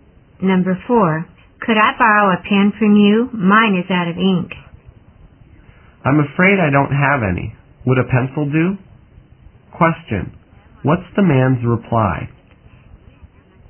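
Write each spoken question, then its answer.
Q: What's the man's reply?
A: He has no pen but offers a pencil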